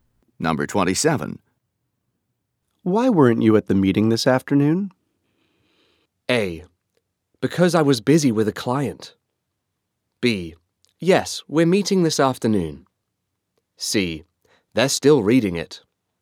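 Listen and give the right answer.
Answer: A: Because I was busy with a client.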